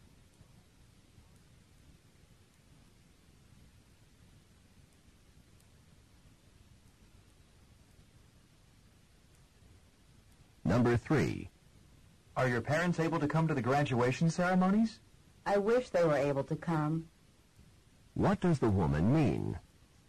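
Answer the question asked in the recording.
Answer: Her parents cannot come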